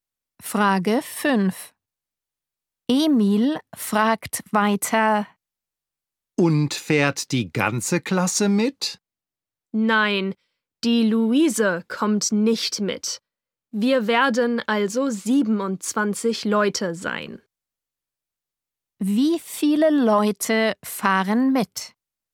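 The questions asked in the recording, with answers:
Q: Wie viele Leute fahren mit?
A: 27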